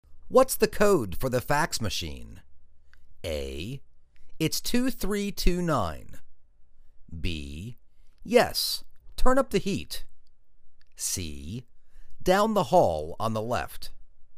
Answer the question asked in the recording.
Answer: It's 2329.